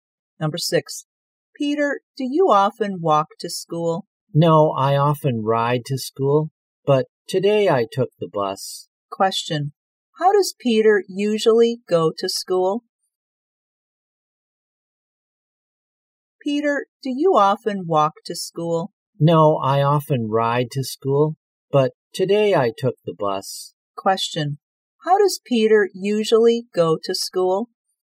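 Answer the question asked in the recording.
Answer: By bike.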